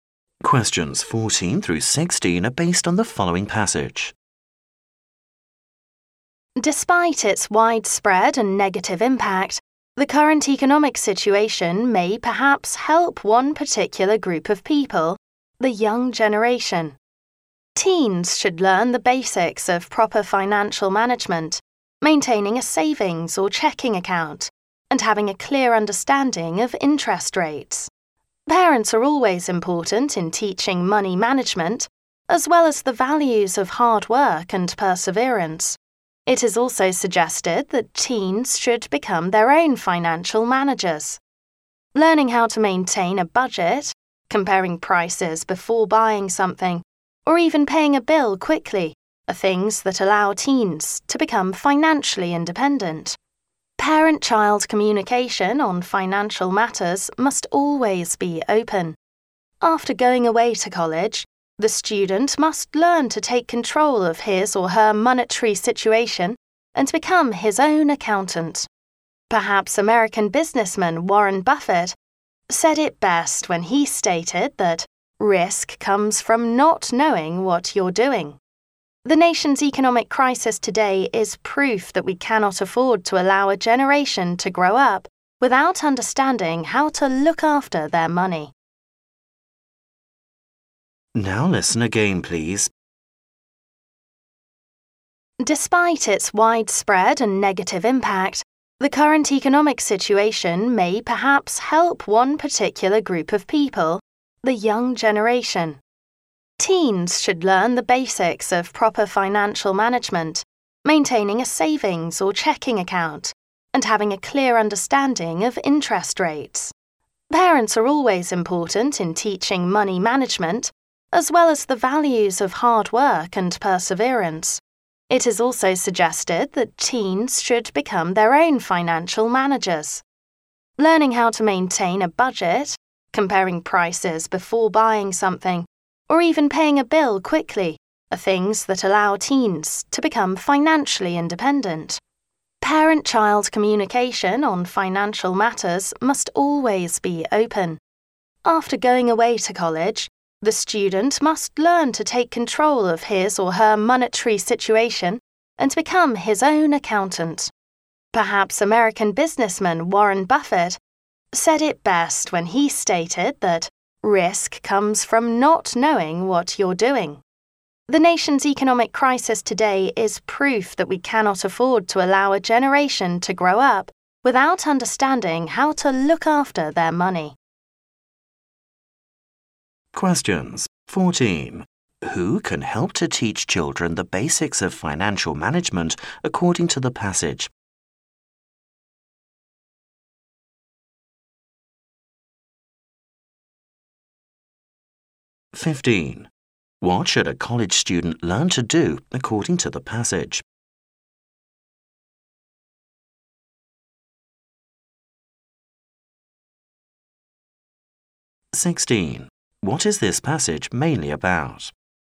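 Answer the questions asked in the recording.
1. Parents
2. Take control of their own money and be their own accountant
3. Young people need to learn how to manage money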